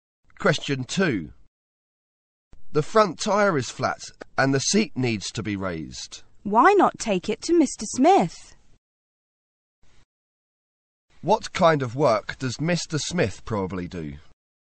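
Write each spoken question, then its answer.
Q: What kind of work does Mr.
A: He repairs bicycles.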